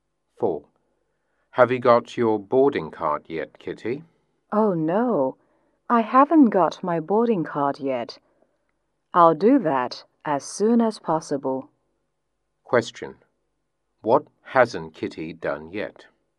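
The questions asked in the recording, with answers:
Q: Question. What hasn't Kitty done yet?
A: Got her boarding card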